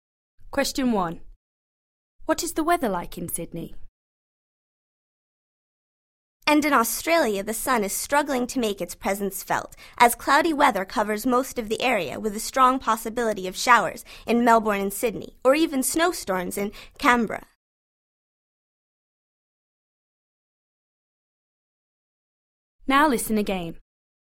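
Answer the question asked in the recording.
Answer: Cloudy, with likely showers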